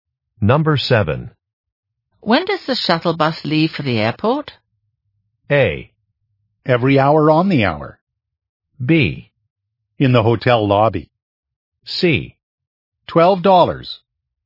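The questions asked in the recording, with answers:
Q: When does the shuttle bus leave for the airport?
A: A: Every hour on the hour.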